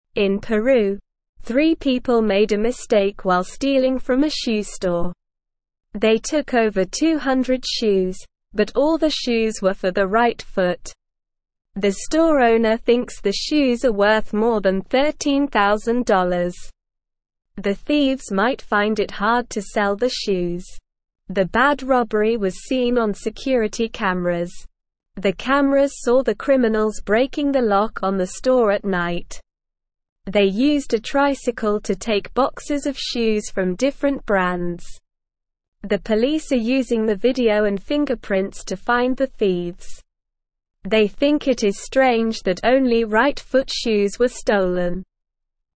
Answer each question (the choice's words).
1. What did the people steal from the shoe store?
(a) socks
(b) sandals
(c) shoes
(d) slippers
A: shoes

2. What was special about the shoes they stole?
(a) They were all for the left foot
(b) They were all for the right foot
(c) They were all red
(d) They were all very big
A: They were all for the right foot

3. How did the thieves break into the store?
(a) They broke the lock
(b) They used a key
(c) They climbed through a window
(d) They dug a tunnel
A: They broke the lock

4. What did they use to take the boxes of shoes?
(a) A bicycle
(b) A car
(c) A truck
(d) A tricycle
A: A tricycle

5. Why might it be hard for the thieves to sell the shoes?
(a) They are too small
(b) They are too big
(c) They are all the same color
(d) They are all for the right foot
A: They are all for the right foot

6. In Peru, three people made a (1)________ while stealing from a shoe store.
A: mistake

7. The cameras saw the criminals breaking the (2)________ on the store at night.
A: lock

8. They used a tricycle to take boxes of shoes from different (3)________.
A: brands

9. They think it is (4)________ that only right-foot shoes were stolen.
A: strange

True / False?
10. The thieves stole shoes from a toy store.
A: False

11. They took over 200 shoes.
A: True

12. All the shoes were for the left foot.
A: False

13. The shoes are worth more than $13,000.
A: True

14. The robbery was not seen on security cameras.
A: False

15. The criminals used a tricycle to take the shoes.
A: True

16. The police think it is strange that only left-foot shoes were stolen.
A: False

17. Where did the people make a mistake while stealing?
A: The people made a mistake while stealing in Peru.

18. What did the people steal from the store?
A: The people stole shoes from the store.

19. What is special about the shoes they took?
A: All the shoes they took were for the right foot.

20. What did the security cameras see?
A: The security cameras saw the criminals breaking the lock on the store at night.

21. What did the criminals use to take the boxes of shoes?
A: The criminals used a tricycle to take the boxes of shoes.

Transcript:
In Peru, three people made a mistake while stealing from a shoe store. They took over 200 shoes, but all the shoes were for the right foot. The store owner thinks the shoes are worth more than $13,000. The thieves might find it hard to sell the shoes.
The bad robbery was seen on security cameras. The cameras saw the criminals breaking the lock on the store at night. They used a tricycle to take boxes of shoes from different brands. The police are using the video and fingerprints to find the thieves. They think it is strange that only right-foot shoes were stolen.

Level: Level 1